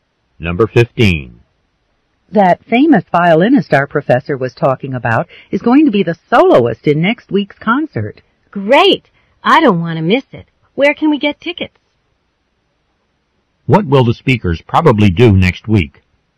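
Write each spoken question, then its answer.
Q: What will the speakers probably do next week?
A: Go to the concert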